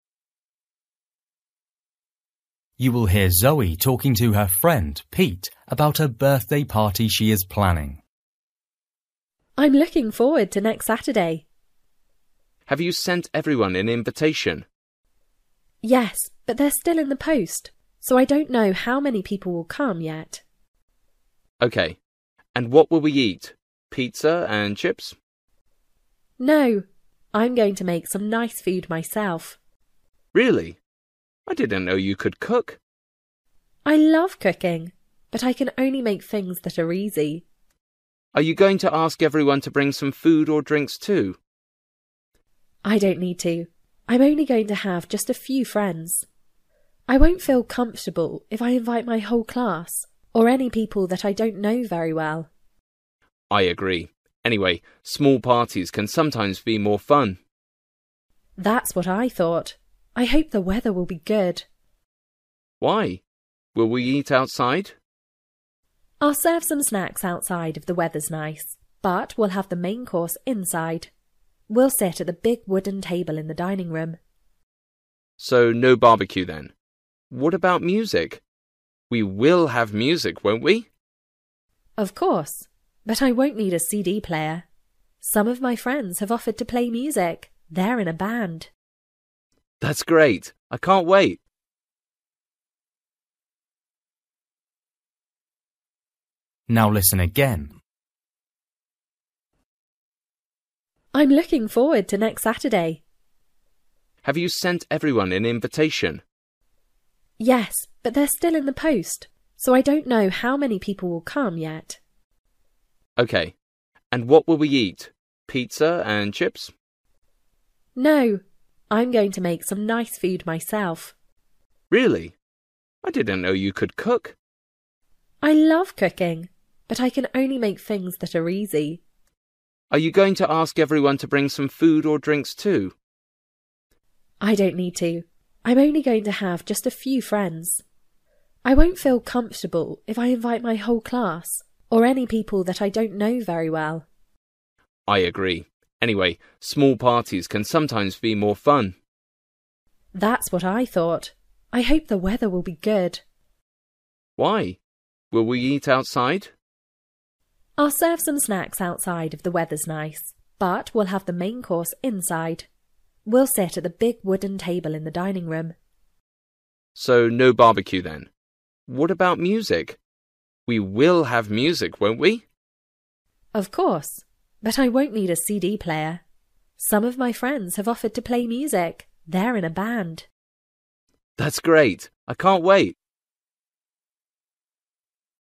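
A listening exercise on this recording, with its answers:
For each question, choose the correct answer.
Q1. Why doesn't Zoe know how many guests will come to her party?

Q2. Guests will probably eat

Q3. Who has Zoe invited?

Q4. If the weather's good, Zoe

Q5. What will some of Zoe's friends do?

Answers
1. The invitations are still in the post.
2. simple food Zoe makes herself
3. just a few friends
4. will serve some snacks outside
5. play music (they're in a band)

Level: Luyện nghe trình độ A2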